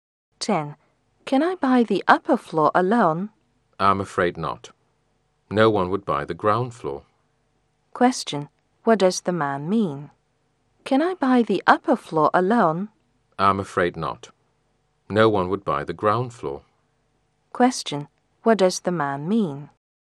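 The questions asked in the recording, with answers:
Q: What does the man mean?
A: The upper floor can't be bought alone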